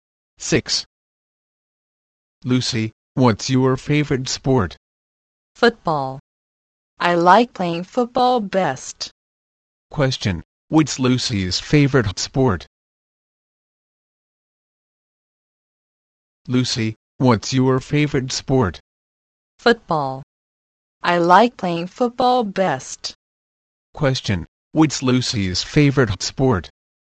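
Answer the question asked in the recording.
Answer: Football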